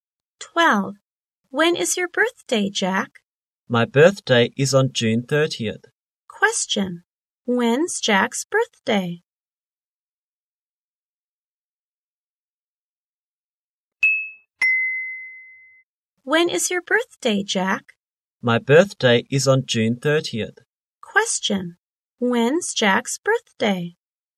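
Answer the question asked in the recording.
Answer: June 30th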